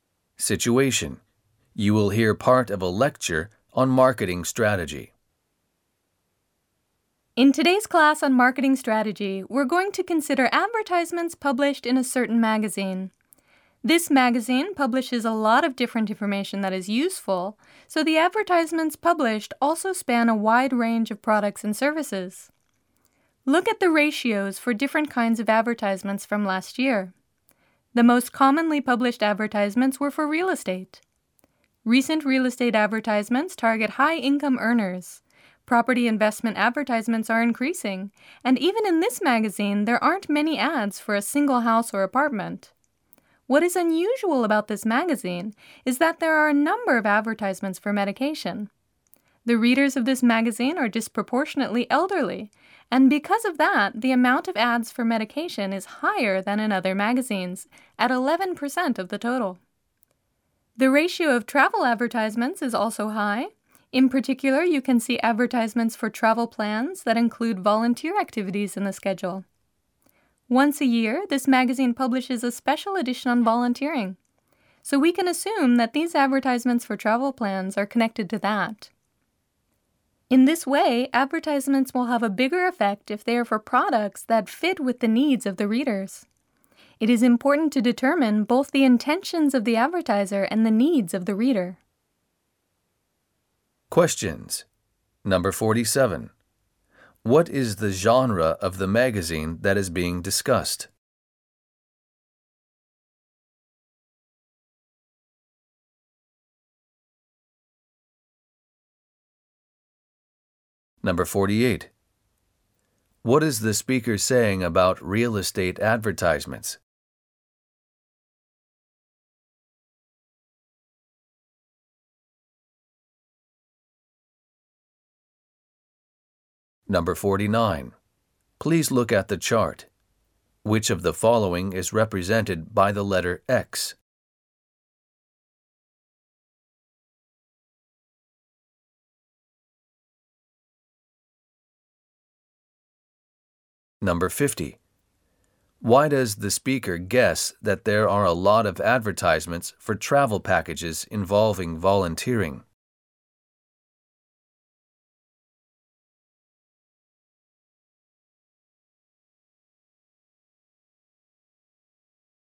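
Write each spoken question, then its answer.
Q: What is the speaker saying about real estate advertisements?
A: They target high-income earners.

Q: Why does the speaker guess that there are a lot of advertisements for travel packages involving volunteering?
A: Because the magazine publishes a special edition on volunteering once a year.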